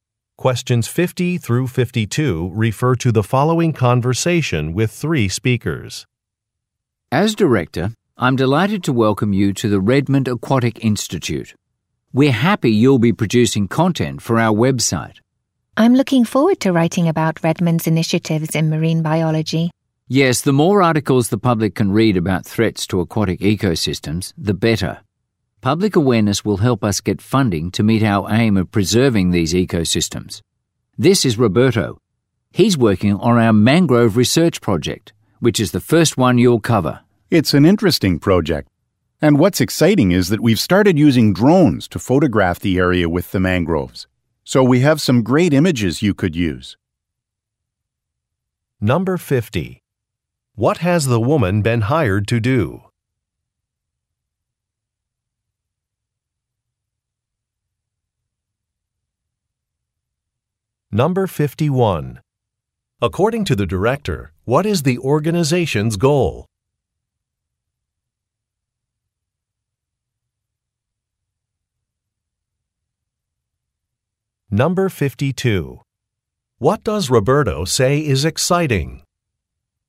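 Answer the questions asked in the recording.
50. Write articles for the website
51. Preserving aquatic ecosystems
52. Using drones to photograph the mangroves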